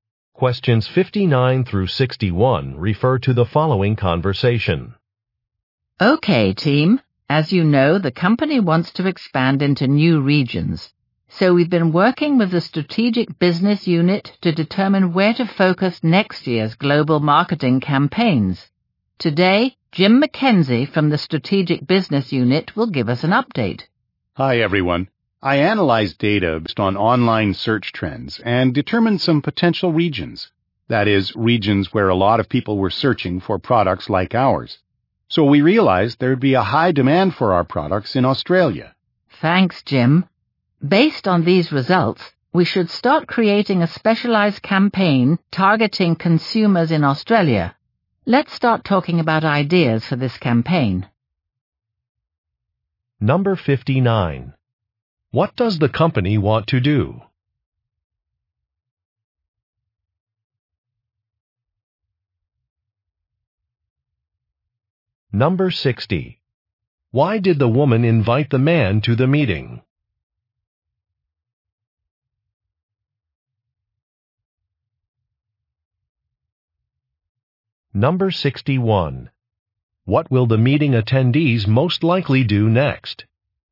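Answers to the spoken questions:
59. Expand into new regions
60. To give an update on his data analysis
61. Discuss ideas for the Australia campaign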